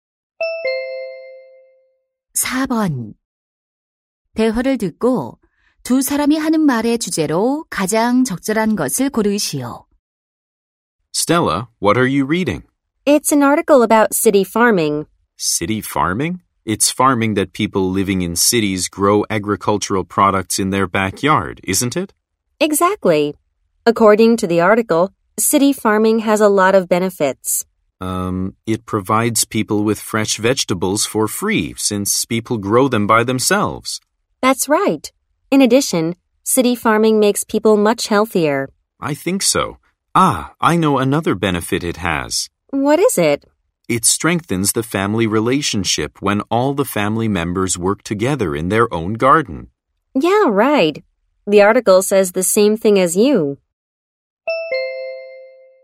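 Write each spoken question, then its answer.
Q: 대화를 듣고 두 사람이 하는 말의 주제로 가장 적절한 것을 고르시오.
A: 도시 농업의 이점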